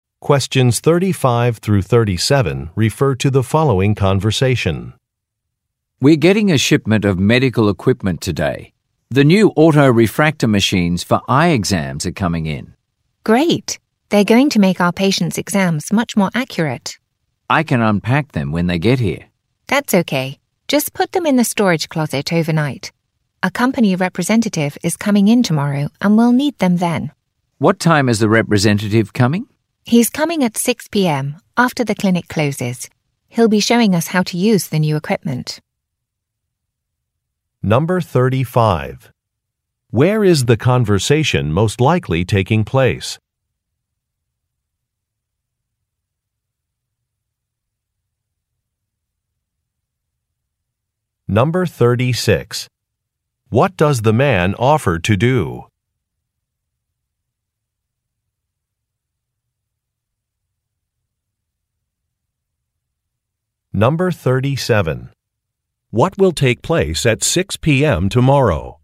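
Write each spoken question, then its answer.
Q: Where is the conversation most likely taking place?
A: At an eye clinic

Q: What will take place at 6 p.m. tomorrow?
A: A training session on the new equipment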